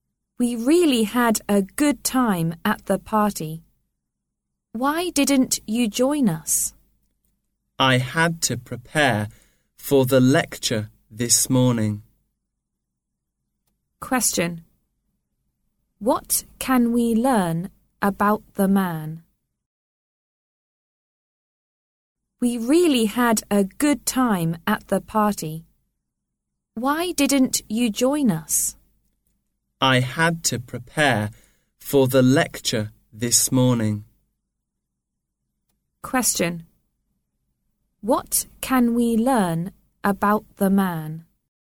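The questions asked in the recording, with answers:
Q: What can we learn about the man?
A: He didn't go to the party because he had to prepare for the lecture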